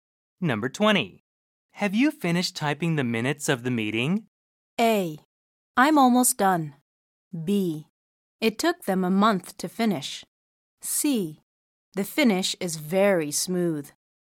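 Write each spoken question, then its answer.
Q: Have you finished typing the minutes of the meeting?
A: A: I'm almost done.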